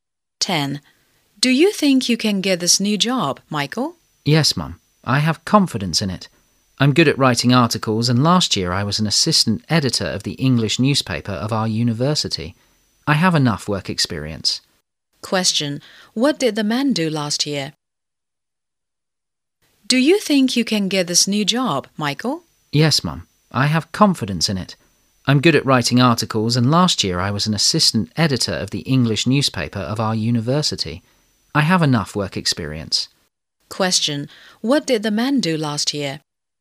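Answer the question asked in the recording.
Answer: He was an assistant editor of the English newspaper of his university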